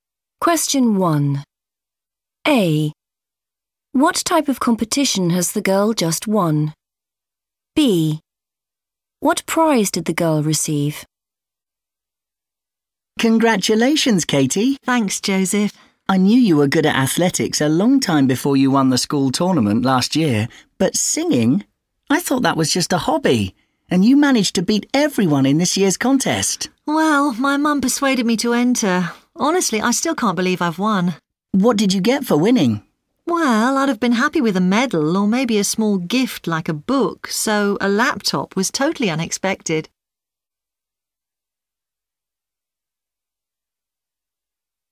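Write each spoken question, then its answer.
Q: What type of competition has the girl just won?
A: singing

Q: What prize did the girl receive?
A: a laptop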